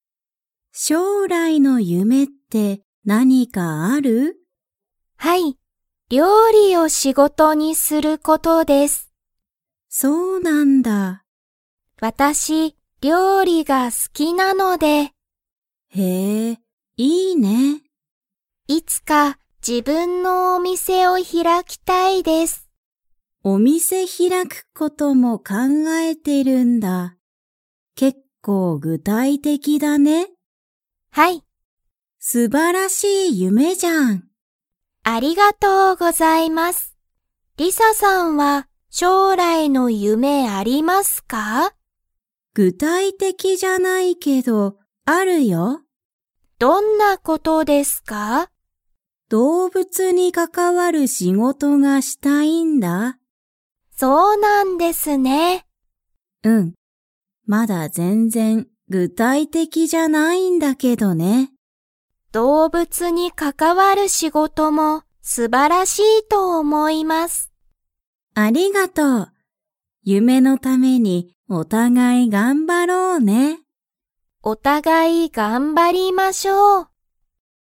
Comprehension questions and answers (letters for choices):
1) あかりは、何なにが好すきですか?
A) 仕事しごと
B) 動物どうぶつ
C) 料理りょうり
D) 勉強べんきょう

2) りさは夢が 。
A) ある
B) ない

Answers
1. C
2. A

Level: Level 3